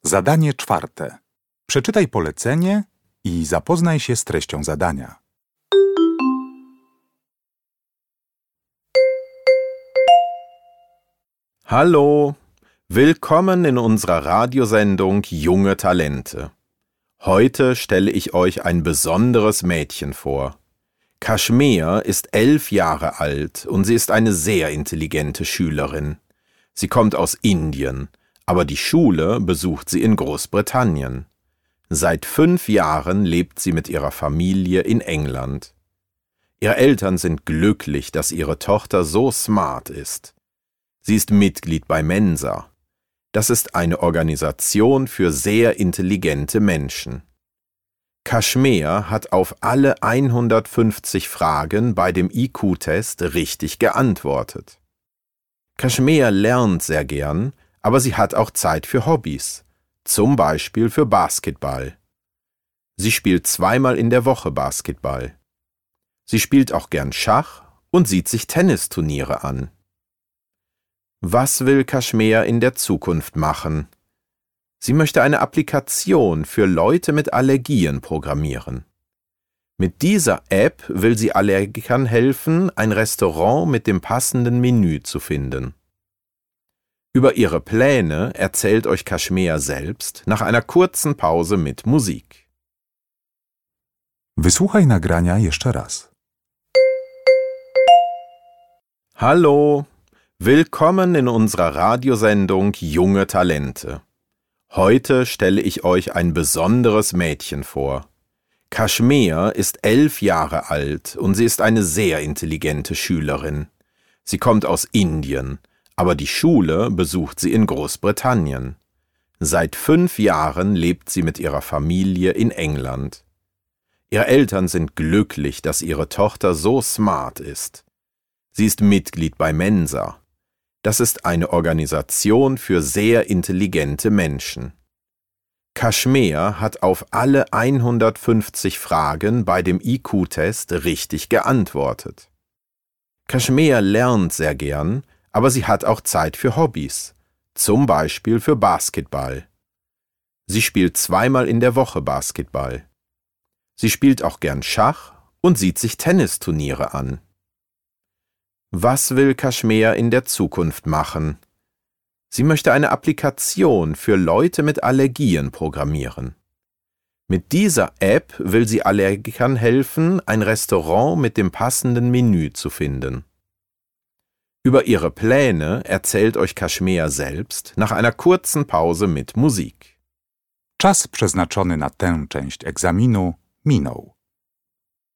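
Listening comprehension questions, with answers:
Uruchamiając odtwarzacz z oryginalnym nagraniem CKE usłyszysz dwukrotnie początek audycji radiowej o pewnej bardzo inteligentnej osobie. Na podstawie informacji zawartych w nagraniu uzupełnij luki 4.1.–4.3. w zdaniach, tak aby jak najbardziej precyzyjnie oddać sens wysłuchanego tekstu. Luki należy uzupełnić w języku niemieckim.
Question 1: Kashmea wohnt jetzt in 4.1. .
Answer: England

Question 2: In ihrer Freizeit spielt Kashmea gern 4.2. und Schach.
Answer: Basketball

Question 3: Kashmea plant eine 4.3. für Allergiker.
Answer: App

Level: egzamin ósmoklasisty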